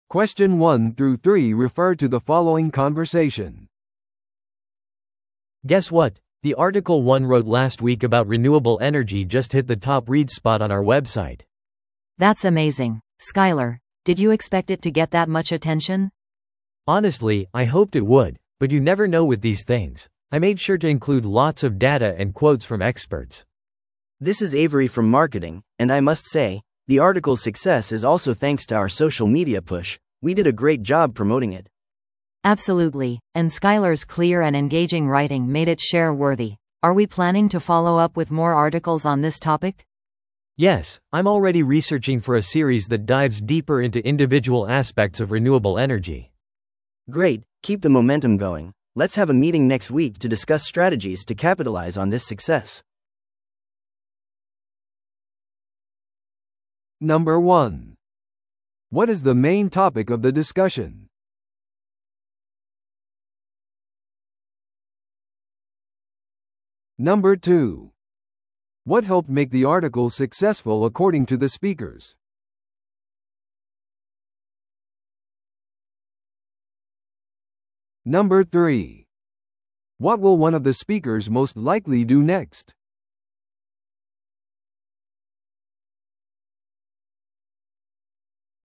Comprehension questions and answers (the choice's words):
Listen to the audio below and answer the questions.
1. What is the main topic of the discussion?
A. ソーシャルメディアのマーケティングキャンペーンの成果。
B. ある編集者の記事がウェブサイトで最も読まれた状態になる。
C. 執筆戦略について話し合う会議の日程調整。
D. 再生可能エネルギーに関する一連の記事を企画する。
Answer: ある編集者の記事がウェブサイトで最も読まれた状態になる。

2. What helped make the article successful according to the speakers?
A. 有名な専門家との独占インタビュー。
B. データと専門家の見解を取り入れるライターの努力。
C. テレビやラジオでの記事の宣伝。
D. 関連する本の出版。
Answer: データと専門家の見解を取り入れるライターの努力。

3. What will one of the speakers most likely do next?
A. 次の記事のための新しいマーケティングキャンペーンを準備する。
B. さらなる戦略について話し合う会議を組織する。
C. 今後の記事シリーズのための専門家へのインタビュー。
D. 記事の成功に関する社説を書く。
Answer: さらなる戦略について話し合う会議を組織する。

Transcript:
A: Guess what? The article I wrote last week about renewable energy just hit the top-read spot on our website!
B: That's amazing, Skyler! Did you expect it to get that much attention?
A: Honestly, I hoped it would, but you never know with these things. I made sure to include lots of data and quotes from experts.
C: This is Avery from marketing, and I must say, the article's success is also thanks to our social media push. We did a great job promoting it!
B: Absolutely, and Skyler's clear and engaging writing made it share-worthy. Are we planning to follow up with more articles on this topic?
A: Yes, I'm already researching for a series that dives deeper into individual aspects of renewable energy.
C: Great, keep the momentum going. Let's have a meeting next week to discuss strategies to capitalize on this success.